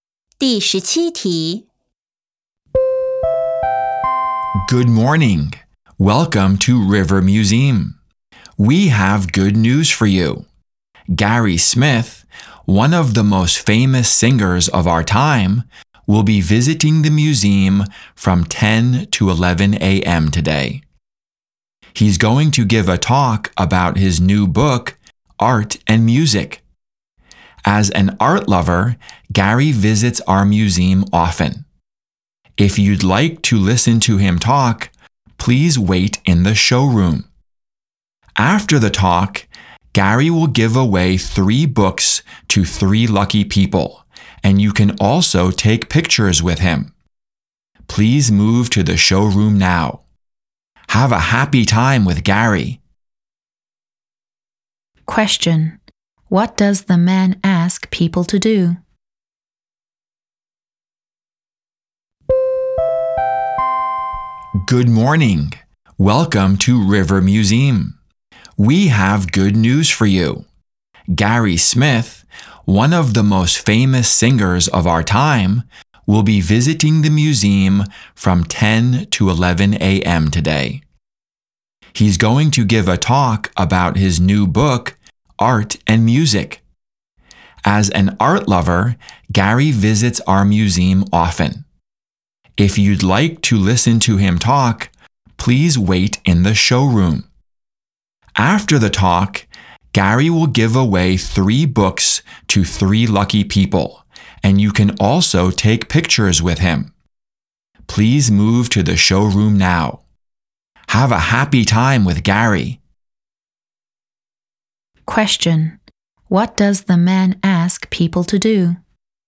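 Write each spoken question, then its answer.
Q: What does the man ask people to do?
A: Move to the showroom to listen to Gary's talk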